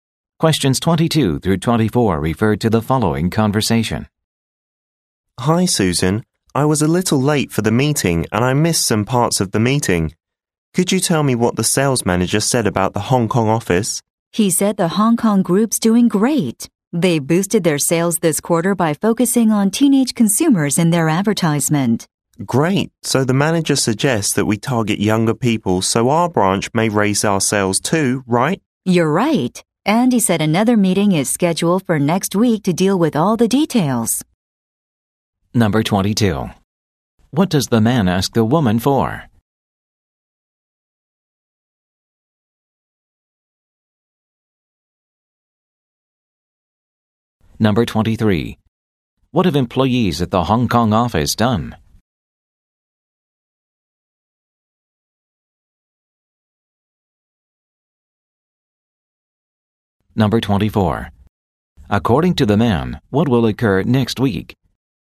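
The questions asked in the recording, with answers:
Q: What does the man ask the woman for?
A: What the sales manager said about the Hong Kong office

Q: What have employees at the Hong Kong office done?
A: Boosted sales by targeting teenagers in ads

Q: According to the man, what will occur next week?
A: Another meeting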